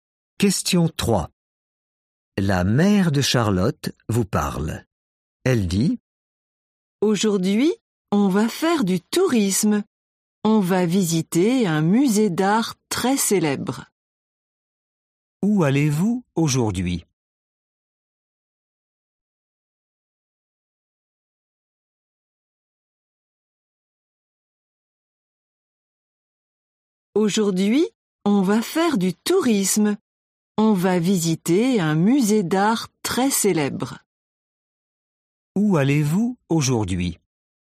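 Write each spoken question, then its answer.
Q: Où allez-vous aujourd'hui ?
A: Dans un musée d'art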